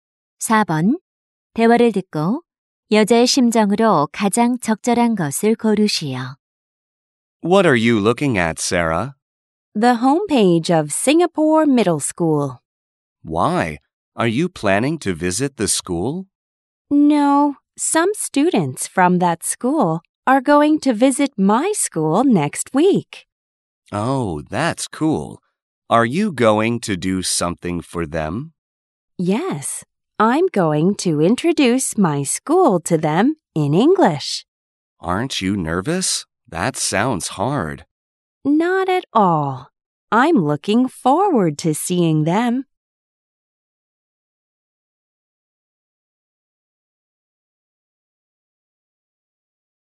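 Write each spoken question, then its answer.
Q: 대화를 듣고 여자의 심정으로 가장 적절한 것을 고르시오.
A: 기대되는, 설레는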